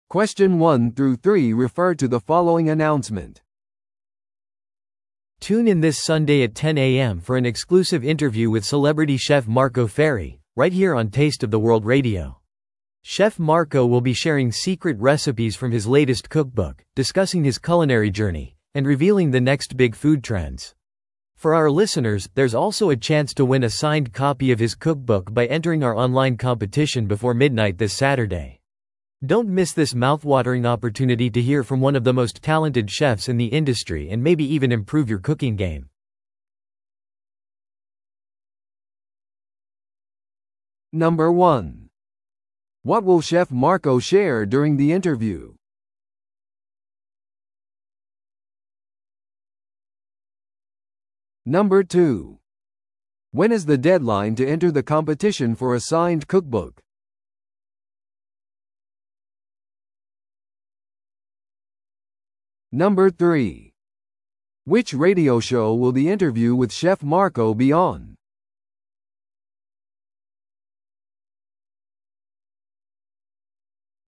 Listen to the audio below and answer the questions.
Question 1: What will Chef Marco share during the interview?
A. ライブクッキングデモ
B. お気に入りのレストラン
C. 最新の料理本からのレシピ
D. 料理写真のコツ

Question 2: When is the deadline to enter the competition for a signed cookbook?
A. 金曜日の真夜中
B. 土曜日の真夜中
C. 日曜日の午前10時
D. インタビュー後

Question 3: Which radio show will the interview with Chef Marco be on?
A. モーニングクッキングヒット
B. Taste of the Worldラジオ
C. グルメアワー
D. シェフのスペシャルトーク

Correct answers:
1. C. 最新の料理本からのレシピ
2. B. 土曜日の真夜中
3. B. Taste of the Worldラジオ

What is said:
Tune in this Sunday at 10am for an exclusive interview with celebrity chef Marco Ferri, right here on Taste of the World Radio. Chef Marco will be sharing secret recipes from his latest cookbook, discussing his culinary journey, and revealing the next big food trends. For our listeners, there's also a chance to win a signed copy of his cookbook by entering our online competition before midnight this Saturday. Don't miss this mouthwatering opportunity to hear from one of the most talented chefs in the industry and maybe even improve your cooking game.

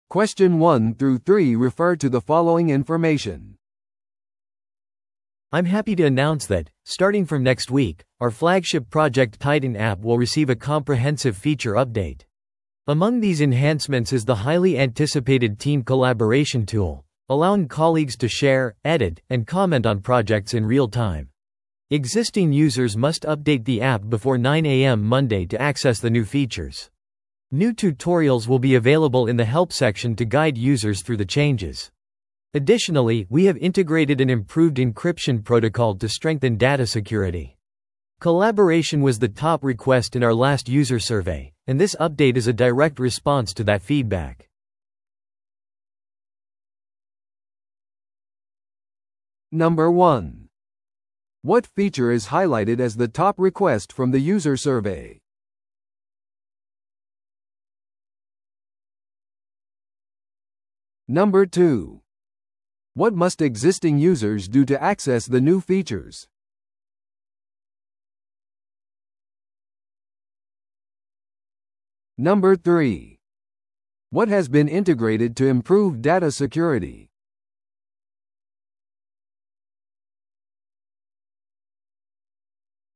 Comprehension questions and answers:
Listen to the audio below and answer the questions.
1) What feature is highlighted as the top request from the user survey?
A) リアルタイムでのプロジェクト共有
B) データのセキュリティ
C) チームコラボレーション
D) ユーザーチュートリアル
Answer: C) チームコラボレーション

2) What must existing users do to access the new features?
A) 新しいアカウントに登録する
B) 月曜日の9amまでにアプリを更新する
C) アプリをアンインストールして再インストールする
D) 新機能へのアクセスのために支払う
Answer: B) 月曜日の9amまでにアプリを更新する

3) What has been integrated to improve data security?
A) ユーザー認証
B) 二段階認証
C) 生体認証ロック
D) 改良された暗号化プロトコル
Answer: D) 改良された暗号化プロトコル

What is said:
I'm happy to announce that, starting from next week, our flagship Project Titan app will receive a comprehensive feature update. Among these enhancements is the highly anticipated team collaboration tool, allowing colleagues to share, edit, and comment on projects in real time. Existing users must update the app before 9am Monday to access the new features. New tutorials will be available in the help section to guide users through the changes. Additionally, we have integrated an improved encryption protocol to strengthen data security. Collaboration was the top request in our last user survey, and this update is a direct response to that feedback.

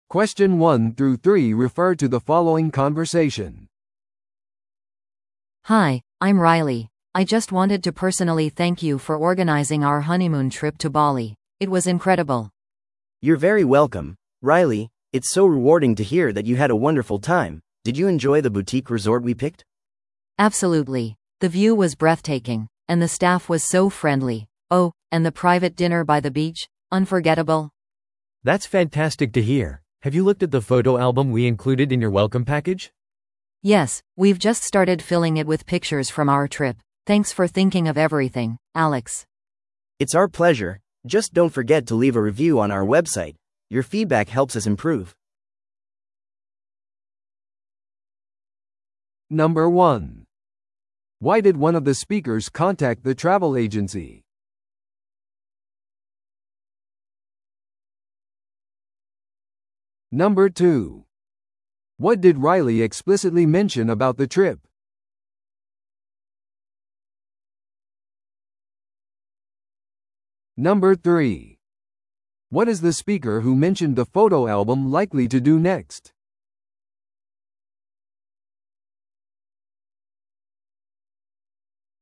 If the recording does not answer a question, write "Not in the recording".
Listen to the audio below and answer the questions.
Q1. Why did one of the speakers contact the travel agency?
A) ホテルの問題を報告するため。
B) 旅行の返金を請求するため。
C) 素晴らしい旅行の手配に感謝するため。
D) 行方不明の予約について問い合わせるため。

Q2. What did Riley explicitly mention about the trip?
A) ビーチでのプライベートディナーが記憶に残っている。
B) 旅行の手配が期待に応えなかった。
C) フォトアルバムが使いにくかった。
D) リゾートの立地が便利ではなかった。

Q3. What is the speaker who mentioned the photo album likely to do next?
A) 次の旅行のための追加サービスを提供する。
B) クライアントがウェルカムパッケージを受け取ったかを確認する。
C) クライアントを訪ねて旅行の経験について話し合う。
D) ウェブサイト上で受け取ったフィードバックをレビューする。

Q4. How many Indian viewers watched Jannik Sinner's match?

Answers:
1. C) 素晴らしい旅行の手配に感謝するため。
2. A) ビーチでのプライベートディナーが記憶に残っている。
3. D) ウェブサイト上で受け取ったフィードバックをレビューする。
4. Not in the recording

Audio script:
A: Hi, I'm Riley, I just wanted to personally thank you for organizing our honeymoon trip to Bali. It was incredible!
B: You're very welcome, Riley! It's so rewarding to hear that you had a wonderful time. Did you enjoy the boutique resort we picked?
A: Absolutely! The view was breathtaking, and the staff was so friendly. Oh, and the private dinner by the beach? Unforgettable!
C: That's fantastic to hear! Have you looked at the photo album we included in your welcome package?
A: Yes, we've just started filling it with pictures from our trip. Thanks for thinking of everything, Alex.
B: It's our pleasure! Just don't forget to leave a review on our website; your feedback helps us improve.

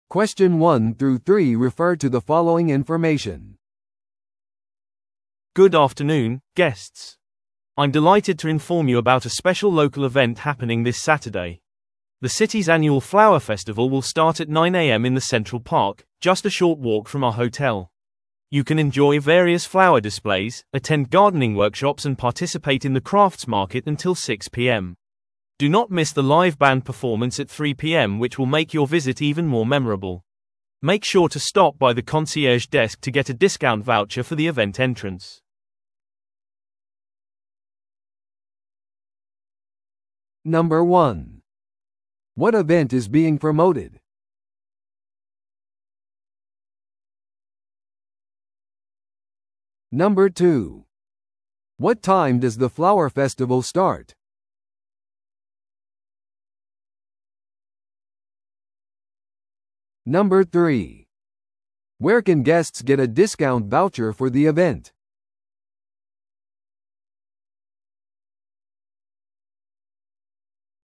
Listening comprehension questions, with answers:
Listen to the audio below and answer the questions.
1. What event is being promoted?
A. ホテル開業式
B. ブックフェア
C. 花フェスティバル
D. クラフトワークショップ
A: C. 花フェスティバル

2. What time does the flower festival start?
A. 午後3時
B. 午後6時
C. 午前9時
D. 正午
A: C. 午前9時

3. Where can guests get a discount voucher for the event?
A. 公園の入り口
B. コンシェルジュデスク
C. クラフト市場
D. オンライン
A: B. コンシェルジュデスク

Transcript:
I'm delighted to inform you about a special local event happening this Saturday. The city's annual flower festival will start at 9am in the central park, just a short walk from our hotel. You can enjoy various flower displays, attend gardening workshops and participate in the crafts market until 6pm. Do not miss the live band performance at 3pm which will make your visit even more memorable. Make sure to stop by the concierge desk to get a discount voucher for the event entrance.

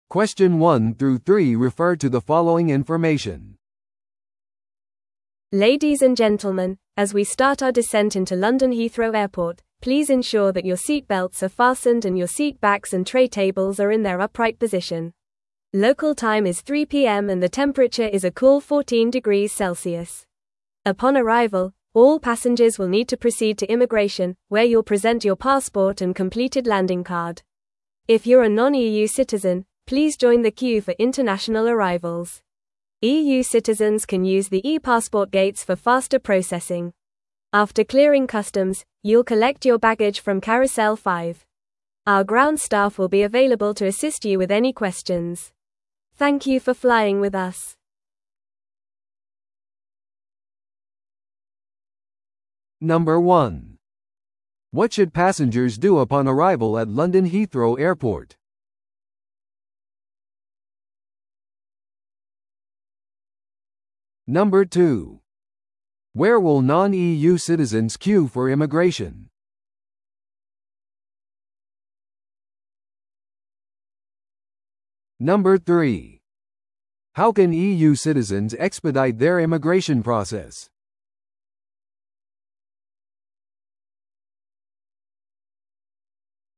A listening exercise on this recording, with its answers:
Listen to the audio below and answer the questions.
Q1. What should passengers do upon arrival at London Heathrow Airport?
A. タクシースタンドに進む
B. 直接乗り継ぎのフライトへ向かう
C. 入国管理局へ行き、パスポートと入国カードを提示する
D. ラウンジでさらなる指示を待つ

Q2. Where will non-EU citizens queue for immigration?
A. EU市民の列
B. eパスポートゲート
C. 国際到着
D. EU以外の国の市民用の特定の列はない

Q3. How can EU citizens expedite their immigration process?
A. VIPサービスを利用することで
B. 追加料金を支払うことで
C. eパスポートゲートを利用することで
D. 搭乗券を提示することで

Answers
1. C. 入国管理局へ行き、パスポートと入国カードを提示する
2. C. 国際到着
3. C. eパスポートゲートを利用することで

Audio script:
Ladies and gentlemen, as we start our descent into London Heathrow Airport, please ensure that your seatbelts are fastened and your seat backs and tray tables are in their upright position. Local time is 3pm and the temperature is a cool 14 degrees Celsius. Upon arrival, all passengers will need to proceed to immigration, where you'll present your passport and completed landing card. If you're a non-EU citizen, please join the queue for international arrivals. EU citizens can use the ePassport gates for faster processing. After clearing customs, you'll collect your baggage from carousel 5. Our ground staff will be available to assist you with any questions. Thank you for flying with us.

